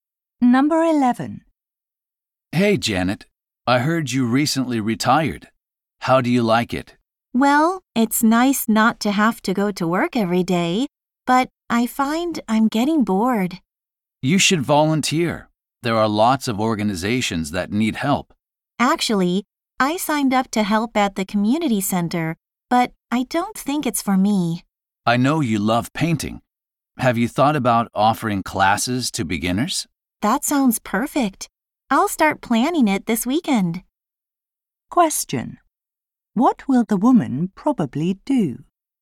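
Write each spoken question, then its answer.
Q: What will the woman probably do?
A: Plan painting classes for beginners.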